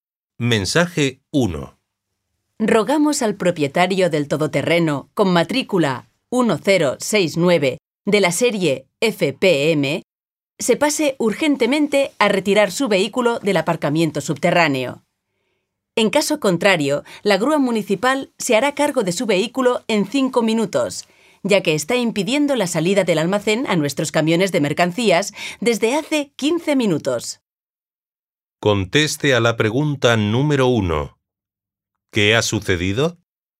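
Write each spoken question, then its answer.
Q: ¿Qué ha sucedido?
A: Un todoterreno aparcado impide la salida de los camiones del almacén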